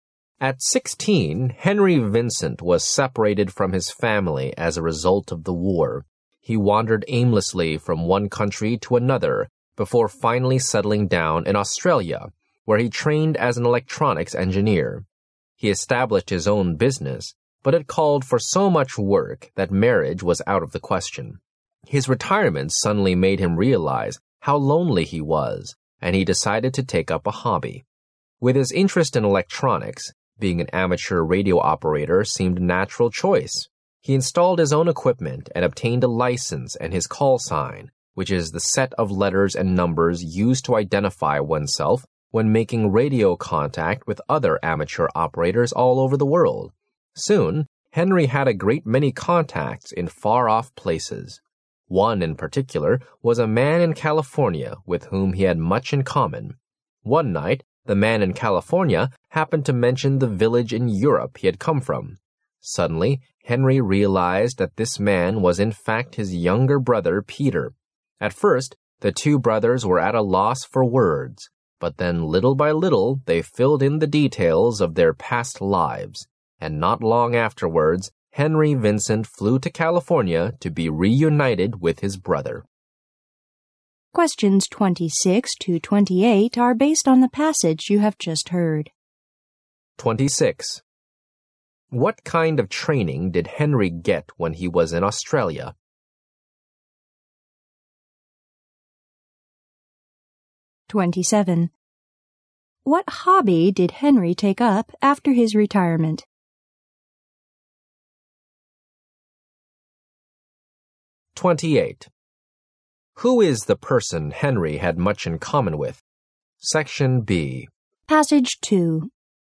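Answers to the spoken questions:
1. Training as an electronics engineer
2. Amateur radio
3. His younger brother Peter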